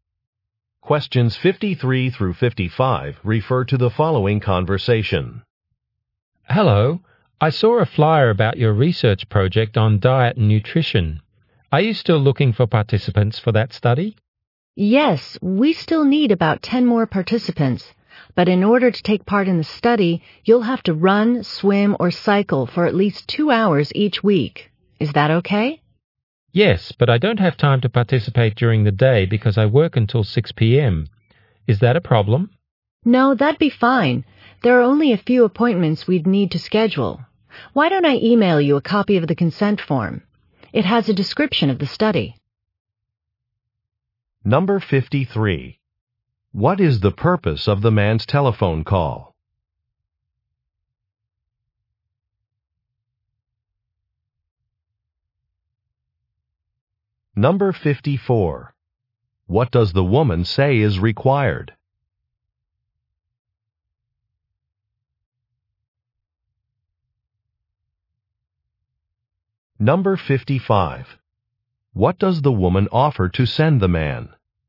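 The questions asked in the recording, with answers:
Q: What is the purpose of the man's telephone call?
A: To ask about taking part in a research study

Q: What does the woman say is required?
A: Running, swimming, or cycling at least 2 hours a week

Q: What does the woman offer to send the man?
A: A consent form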